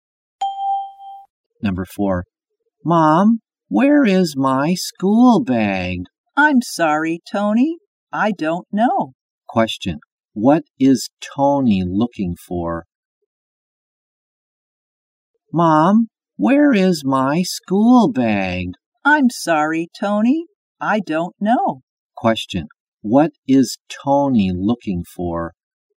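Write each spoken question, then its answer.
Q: What is Tony looking for?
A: His school bag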